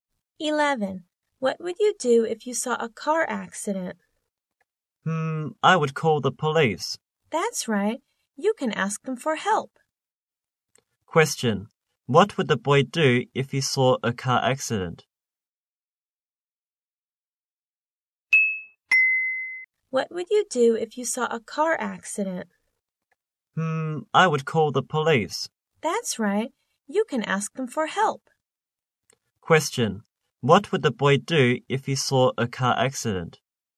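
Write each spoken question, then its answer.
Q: What would the boy do if he saw a car accident?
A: Call the police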